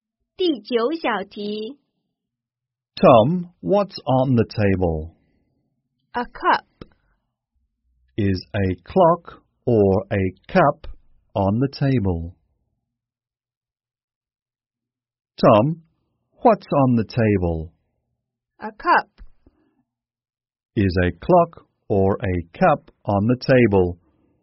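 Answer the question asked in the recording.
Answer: A cup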